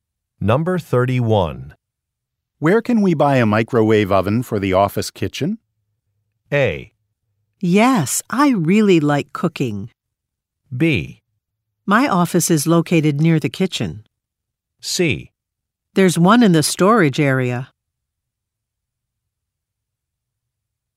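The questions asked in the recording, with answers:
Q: Where can we buy a microwave oven for the office kitchen?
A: C: There's one in the storage area.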